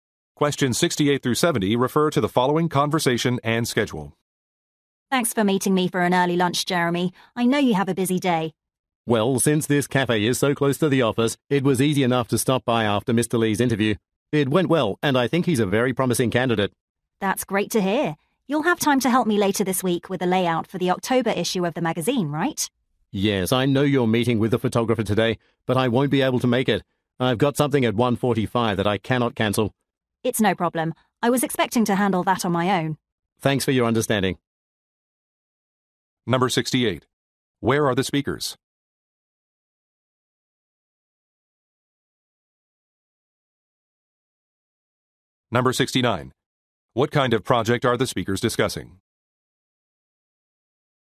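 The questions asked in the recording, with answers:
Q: Where are the speakers?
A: At a cafe

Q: What kind of project are the speakers discussing?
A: A magazine layout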